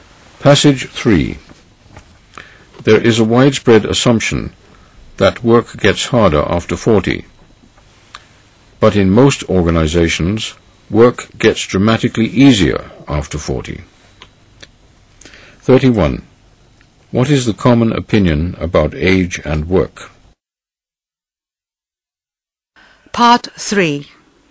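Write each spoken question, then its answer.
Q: What is the common opinion about age and work?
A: That work gets harder after 40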